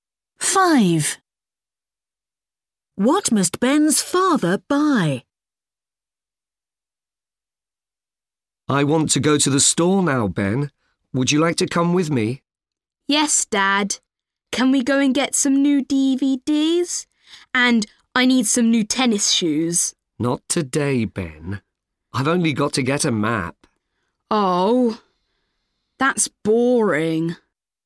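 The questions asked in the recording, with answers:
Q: What must Ben's father buy?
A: A map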